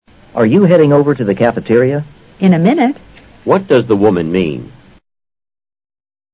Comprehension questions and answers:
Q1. What does the woman mean?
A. She's in charge of the cafeteria.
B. She's going to the cafeteria very soon.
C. She will be in the cafeteria only a little while.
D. She left the cafeteria a few minutes ago.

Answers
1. B

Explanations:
head (to) 是动词,作"前往"解。in a minute 与very soon同义。

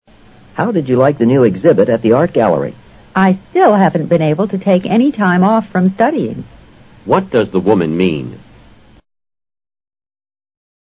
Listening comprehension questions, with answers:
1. What does the woman mean?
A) She prefers the artists she has studied.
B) She hopes they will take some of the paintings away.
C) She hasn't gone to see the exhibit yet.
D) She doesn't want to describe the exhibit.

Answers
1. C

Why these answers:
haven't been able to take any time off from studying 意思是学习太忙还未抽出时间去看展览。这个意思与C是一致的。exhibit: 展品。art gallery: 画廊。

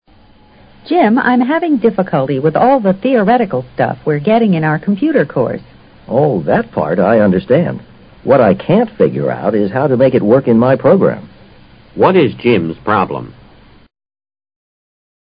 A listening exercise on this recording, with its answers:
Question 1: What is Jim's problem?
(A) His computer doesn't work.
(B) He doesn't understand his stuff.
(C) He doesn't know how to apply computer theory.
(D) He registered for the wrong course.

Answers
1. C

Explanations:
Jim虽然懂得计算机的有关原理,却不会上机运用,这就是他的问题。have difficulty with all the theoretical stuff: 对那些理论性的东西闹不明白。figure out: 领会出;解决。He doesn't know how to apply computer theory 与I can't figure out how to make it work in my program所表达的意思相同。

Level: 世博高级听说

